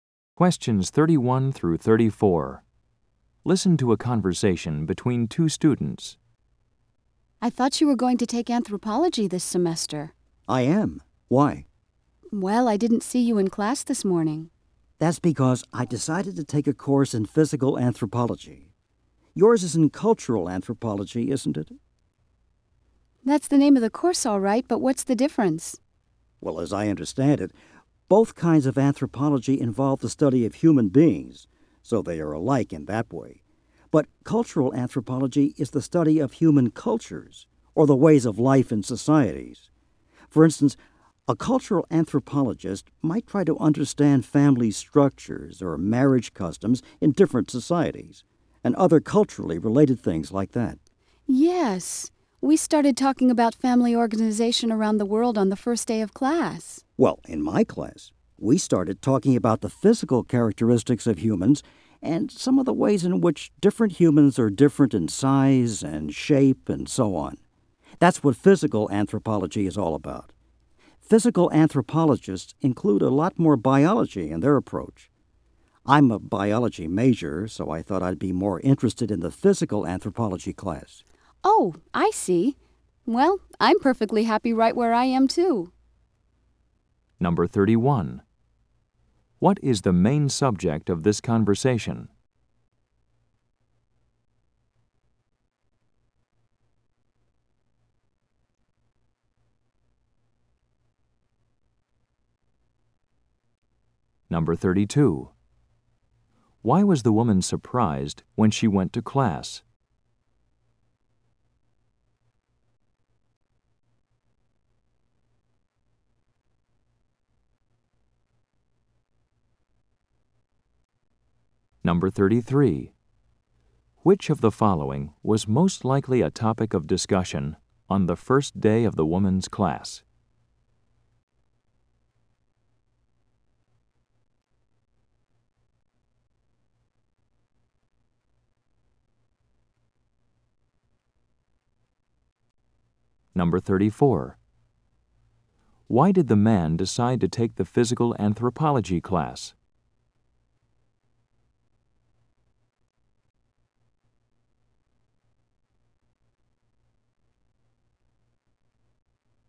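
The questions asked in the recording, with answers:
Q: What is the main subject of this conversation?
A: The difference between cultural and physical anthropology

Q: Why was the woman surprised when she went to class?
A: The man wasn't in her anthropology class

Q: Why did the man decide to take the physical anthropology class?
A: He is a biology major and it includes more biology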